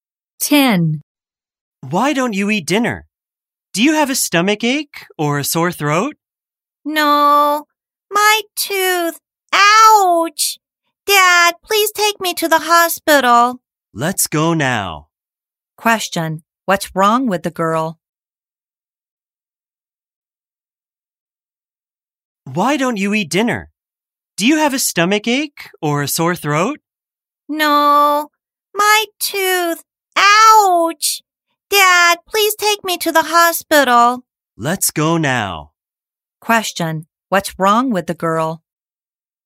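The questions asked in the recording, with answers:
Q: Question, what's wrong with the girl?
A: She has a toothache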